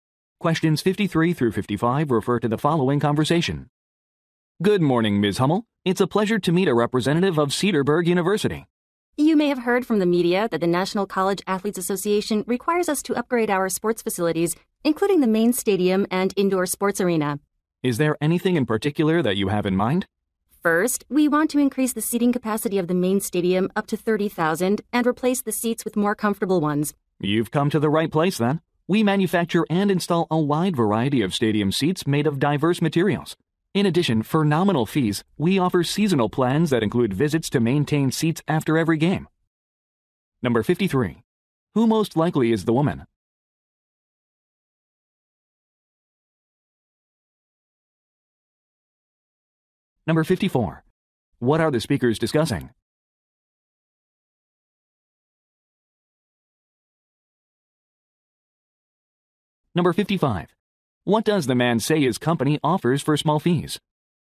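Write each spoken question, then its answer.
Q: Who most likely is the woman?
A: A representative of Cedarburg University

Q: What are the speakers discussing?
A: Upgrading stadium seating

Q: What does the man say his company offers for small fees?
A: Seasonal seat maintenance plans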